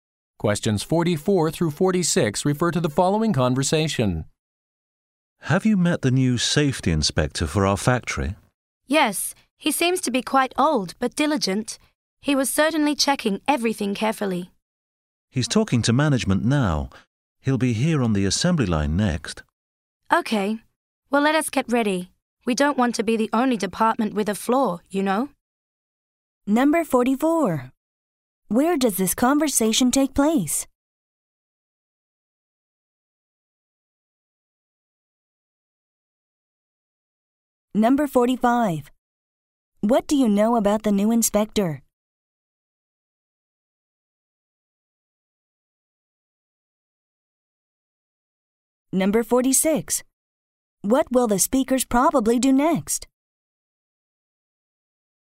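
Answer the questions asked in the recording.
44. At a factory, on the assembly line
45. He seems old but diligent and checks carefully
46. Get ready for the inspection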